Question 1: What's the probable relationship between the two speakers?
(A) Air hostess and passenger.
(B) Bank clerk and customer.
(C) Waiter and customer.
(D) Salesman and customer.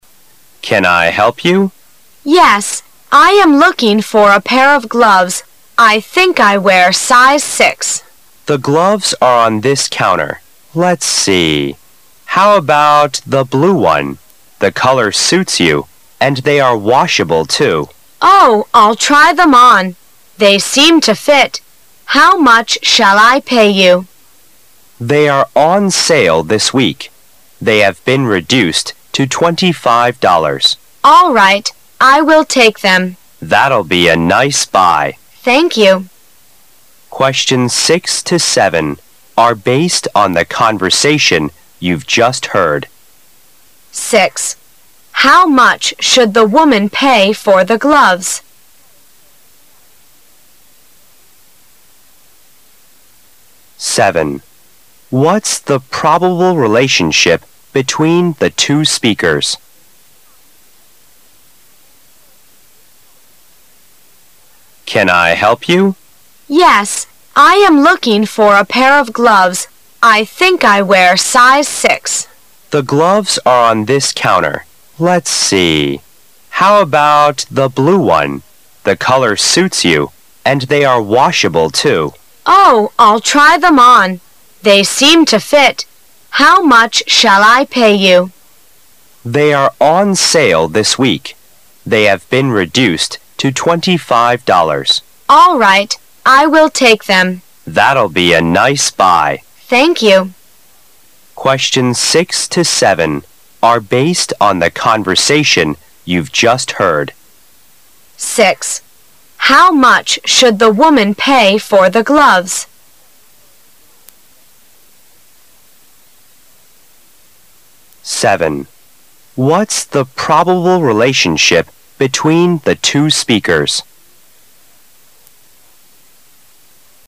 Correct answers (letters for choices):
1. D

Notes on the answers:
本题提问的是两人之间的关系问题,我们可以从售货员的提问Can I helP you?以及顾客所说的 How much shall l pay you?及Thank you.女士说自己正在looking for a pair Of gloves,从这些常用的对话中推测出两者之间的关系。